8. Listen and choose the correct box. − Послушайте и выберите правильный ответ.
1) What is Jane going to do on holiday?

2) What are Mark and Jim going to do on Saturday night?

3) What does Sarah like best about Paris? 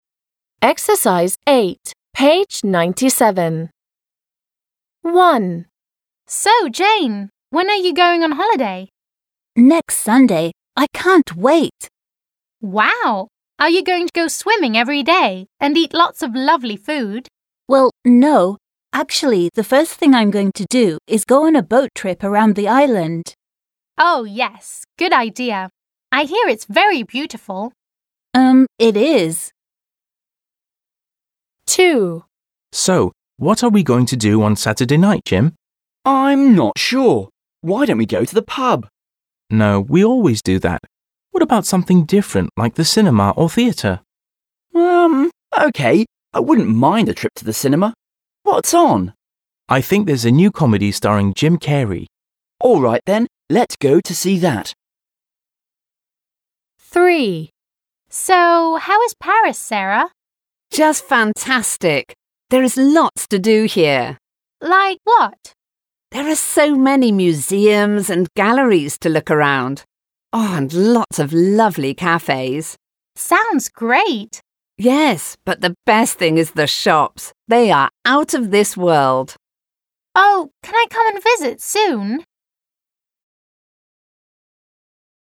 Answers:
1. Jane is going to go on a boat trip around the island.
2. Mark and Jim are going to see a new comedy in the cinema.
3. Sarah likes shops in Paris.

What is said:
Sue: Wow! Are you going to go swimming every day and eat lots of lovely food?
Jane: Well, no. Actually, the first thing I'm going to do is go on a boat trip around the island.
Sue: Oh, yes ... Good idea. I hear it's very beautiful.
2. Mark: So what are we going to do on Saturday night, Jim?
Jim: I'm not sure. Why don't we go to the pub?
Mark: No, we always do that. What about something different like the cinema or theatre?
I wouldn't mind a trip to the cinema. What's on?
Mark: I think there's a new comedy starring Jim Carrey.
Jim: All right then, let's go to see that. − Тогда хорошо, пойдем, посмотрим.
Sarah: Just fantastic. There is lots to do here.
Rachel: Like what? − Например?
Sarah: There are so many museums and galleries to look around. Oh, and lots of lovely cafés.
Sarah: Yes, but the best thing is the shops! They are out of this world!

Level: 6 класс